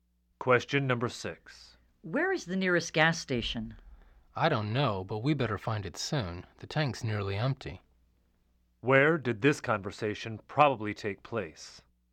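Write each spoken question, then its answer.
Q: Where did this conversation probably take place?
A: In a car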